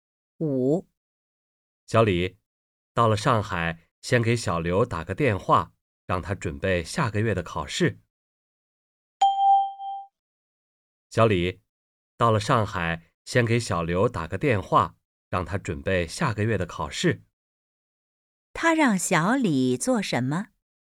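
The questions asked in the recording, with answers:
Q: 他让小李做什么?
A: 到上海后先给小刘打电话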